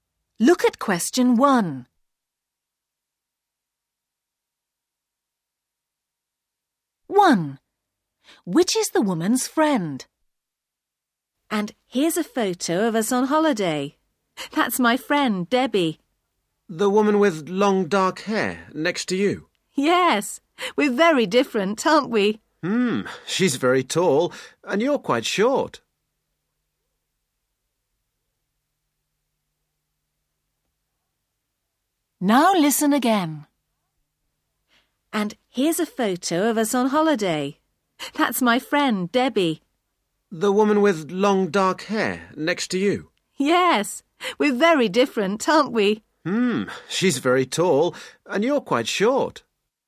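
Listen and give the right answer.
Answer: The tall woman with long dark hair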